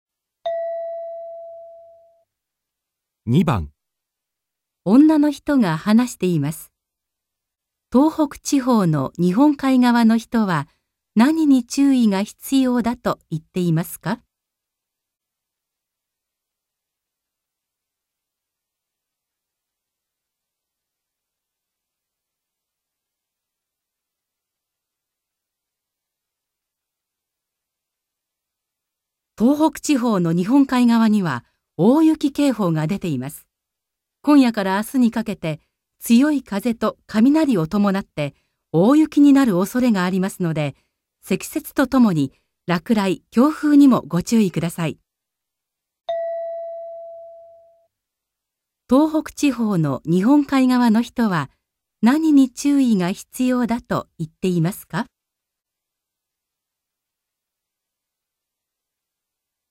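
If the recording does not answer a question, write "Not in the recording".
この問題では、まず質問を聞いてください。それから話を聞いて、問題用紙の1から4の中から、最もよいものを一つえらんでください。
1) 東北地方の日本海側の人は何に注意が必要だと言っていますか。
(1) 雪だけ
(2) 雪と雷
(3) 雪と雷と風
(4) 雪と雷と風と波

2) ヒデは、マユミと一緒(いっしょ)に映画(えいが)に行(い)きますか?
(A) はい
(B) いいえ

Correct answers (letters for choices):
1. 3
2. Not in the recording

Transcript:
F: 東北地方の日本海側には大雪警報が出ています。 今夜から明日にかけて、 強い風と雷をともなって大雪になるおそれがありますので、 積雪とともに、落蕾、強風にもご注意ください。

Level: N2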